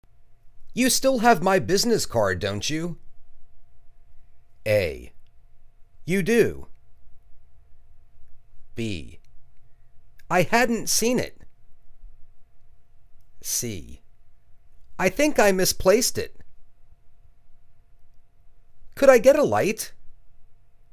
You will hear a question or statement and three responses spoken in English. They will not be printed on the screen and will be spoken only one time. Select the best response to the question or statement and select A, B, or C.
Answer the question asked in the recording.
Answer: I think I misplaced it.